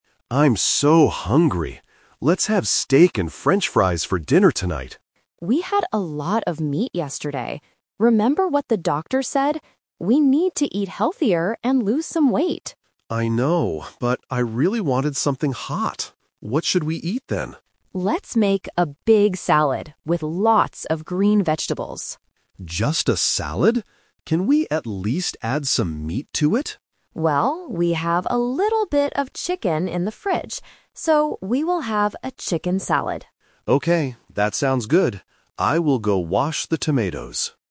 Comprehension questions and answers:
Listen to the conversation between a husband and wife. Choose the correct answer (A, B, or C) for each question.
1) What did the husband originally want to eat for dinner?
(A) A chicken salad.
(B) Steak and french fries.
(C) Vegetable soup.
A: (B) Steak and french fries.

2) Why does the wife want to make a big salad?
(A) Because they need to eat healthier.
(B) Because they do not have any meat in the house.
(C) Because the husband loves eating green vegetables.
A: (A) Because they need to eat healthier.

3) What are they going to eat tonight?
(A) Only green vegetables.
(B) Steak and salad.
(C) Chicken salad.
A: (C) Chicken salad.

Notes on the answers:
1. At the beginning, the husband clearly says, "Let's have steak and french fries for dinner tonight." Option (A) is a trap; it is what they decide to eat at the end, not his original plan. Option (C) is a plausible hot and healthy meal, but it is not mentioned.
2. The wife reminds him of the doctor's advice, saying, "We need to eat healthier". Option (B) is a trap; they do have a little bit of chicken in the fridge. Option (C) is also a trap; the husband didn't want salad at first, he wanted meat.
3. They compromise and decide to make a salad with the chicken from the fridge. Option (A) is a trap; the wife suggests a big salad with green vegetables first, but the husband asks to add meat. Option (B) is a trap; steak was his first idea, but it was rejected.

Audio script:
Husband: I'm so hungry. Let's have steak and french fries for dinner tonight.
Wife: We had a lot of meat yesterday. Remember what the doctor said? We need to eat healthier and lose some weight.
Husband: I know, but I really wanted something hot. What should we eat then?
Wife: Let's make a big salad with lots of green vegetables.
Husband: Just a salad? Can we at least add some meat to it?
Wife: Well, we have a little bit of chicken in the fridge. So, we will have a chicken salad.

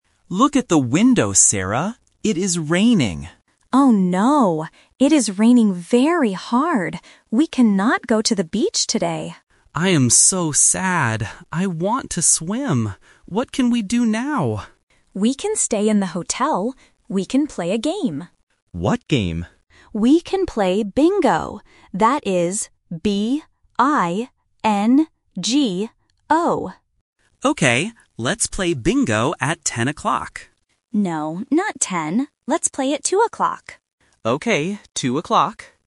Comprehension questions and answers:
Listen to the conversation and choose the correct answer (A, B, or C).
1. Why can they NOT go to the beach?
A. Because it is cold.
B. Because it is raining.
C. Because it is windy.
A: B. Because it is raining.

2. How does the woman spell the name of the game?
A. P-I-N-G-O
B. B-E-N-G-O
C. B-I-N-G-O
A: C. B-I-N-G-O

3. What time will they play the game?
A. At 2 o'clock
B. At 10 o'clock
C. At 12 o'clock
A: A. At 2 o'clock

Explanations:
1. The man says, "It is raining," and the woman confirms, "It is raining very hard. We cannot go to the beach today." Options (A) and (C) are other weather conditions but are not mentioned in the audio.
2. The woman spells the name of the game clearly: B-I-N-G-O. Option (A) is a trap using the letter "P" which sounds similar to "B". Option (B) uses the wrong vowel "E".
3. The man suggests playing at "10 o'clock" (The Trap). However, the woman says, "No, not ten. Let's play at two o'clock." Students must listen for the negative word "No" to find the correct time. Option (C) is not mentioned.

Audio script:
Man: Look at the window, Sarah. It is raining.
Woman: Oh no. It is raining very hard. We cannot go to the beach today.
Man: I am so sad. I want to swim. What can we do now?
Woman: We can stay in the hotel. We can play a game.
Man: What game?
Woman: We can play Bingo. That is B-I-N-G-O.
Man: Okay. Let's play Bingo at 10 o'clock.

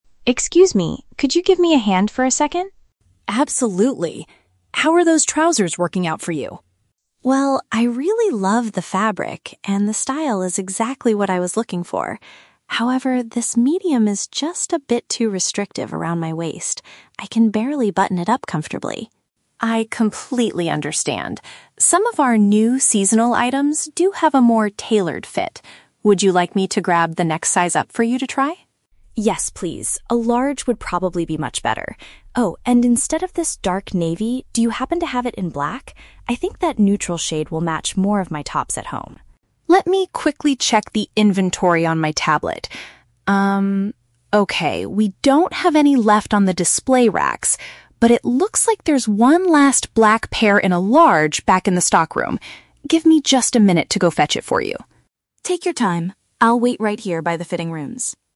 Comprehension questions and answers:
Listen to the conversation between a customer and a shop assistant. For each question, choose the correct answer (A, B, or C).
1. Why is the customer dissatisfied with the clothing item she is trying on?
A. The material feels quite uncomfortable against her skin.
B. It is slightly too tight around her middle.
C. The overall design is not what she originally wanted.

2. What does the customer request for the second pair of trousers?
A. A bigger size and a different color.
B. The exact same size but in a dark navy shade.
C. A completely new style that is easier to button up.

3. Where will the shop assistant get the requested item from?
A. From another branch of the clothing store.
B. From the display racks at the front of the shop.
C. From the storage area in the back.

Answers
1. B. It is slightly too tight around her middle.
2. A. A bigger size and a different color.
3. C. From the storage area in the back.

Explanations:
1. The customer states that the medium size is "too restrictive around my waist," which is paraphrased as "too tight around her middle." Option A is a trap because the customer actually says, "I really love the fabric." Option C is also a trap because she mentions the style is "exactly what I was looking for."
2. The customer agrees to try "the next size up" (a large) and asks for it "in black" instead of dark navy. This perfectly matches option A. Option B is a trap because she is currently wearing dark navy and wants to change it. Option C is a trap; she loves the current style and just needs a bigger size, not a new style.
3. The assistant says the last pair is "back in the stockroom," which is paraphrased as "the storage area in the back." Option A is plausible in a real-life situation but is never mentioned in the audio. Option B is a trap because the assistant specifically notes that they "don't have any left on the display racks."

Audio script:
Customer: Excuse me? Could you give me a hand for a second?
Assistant: Absolutely. How are those trousers working out for you?
Customer: Well, I really love the fabric, and the style is exactly what I was looking for. However, this medium is just a bit too restrictive around my waist. I can barely button it up comfortably.
Assistant: I completely understand. Some of our new seasonal items do have a more tailored fit. Would you like me to grab the next size up for you to try?
Customer: Yes, please. A large would probably be much better. Oh, and instead of this dark navy, do you happen to have it in black? I think that neutral shade will match more of my tops at home.
Assistant: Let me quickly check the inventory on my tablet. okay, we don't have any left on the display racks, but it looks like there's one last black pair in a large back in the stockroom. Give me just a minute to go fetch it for you.

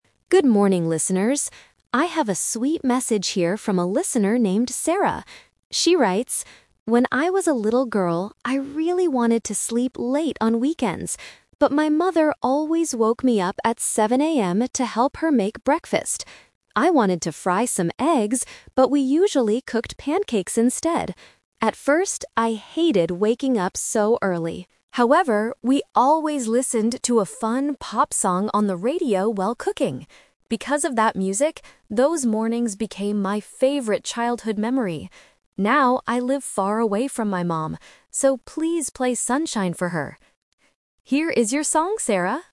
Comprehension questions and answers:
Listen to a radio DJ reading a letter from a listener about a childhood memory. Then, read the questions below and choose the correct answer (A, B, or C) for each question.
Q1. What did Sarah want to do on weekend mornings when she was a child?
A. Wake up at 7 AM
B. Sleep late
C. Listen to the radio in bed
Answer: B. Sleep late

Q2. What food did Sarah and her mother usually cook?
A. Pancakes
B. Fried eggs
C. Sandwiches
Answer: A. Pancakes

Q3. What made Sarah enjoy those early mornings in the end?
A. The delicious food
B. Her mother's stories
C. A fun pop song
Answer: C. A fun pop song

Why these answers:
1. The DJ reads, "When I was a little girl, I really wanted to sleep late on weekends." Option (A) is a trap; waking up at 7 AM is what her mother made her do, not what she wanted. Option (C) is a trap; the radio is mentioned later, but she didn't listen to it in bed.
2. The letter says, "...we usually cooked pancakes instead." Option (B) is a trap; Sarah wanted to fry eggs, but they didn't do it. Option (C) is a plausible breakfast food, but it is never mentioned in the audio.
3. Sarah explains her twist by saying, "However, we always listened to a fun pop song... Because of that music, those mornings became my favorite childhood memory." Option (A) is a trap; they cooked food, but the music is what made her love the mornings. Option (B) is a plausible memory, but her mother's stories are not mentioned.

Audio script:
Good morning, listeners! I have a sweet message here from a listener named Sarah. She writes: 'When I was a little girl, I really wanted to sleep late on weekends. But my mother always woke me up at 7 AM to help her make breakfast. I wanted to fry some eggs, but we usually cooked pancakes instead. At first, I hated waking up so early. However, we always listened to a fun pop song on the radio while cooking. Because of that music, those mornings became my favorite childhood memory. Now, I live far away from my mom. So, please play Sunshine for her!' Here is your song, Sarah!

